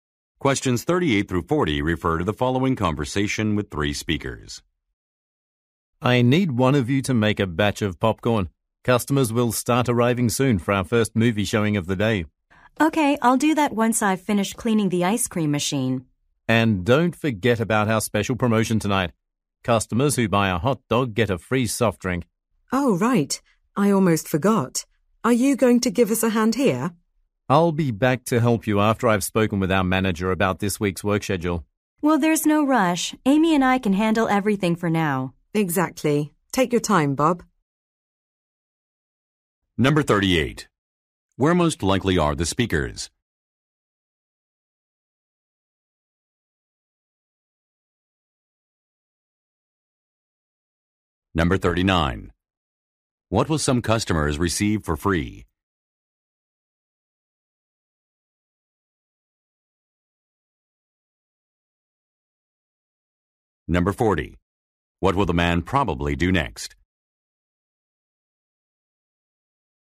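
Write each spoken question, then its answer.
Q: Where most likely are the speakers?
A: At a movie theater

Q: What will some customers receive for free?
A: A soft drink (when they buy a hot dog)

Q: What will the man probably do next?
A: Speak with the manager about the work schedule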